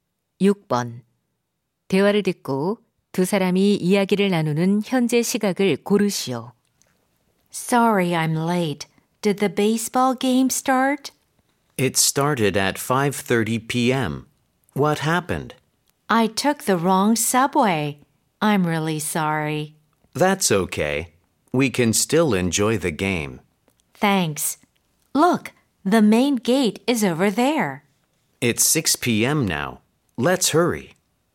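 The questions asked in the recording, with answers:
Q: 대화를 듣고 두 사람이 이야기를 나누는 현재 시각을 고르시오.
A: 오후 6시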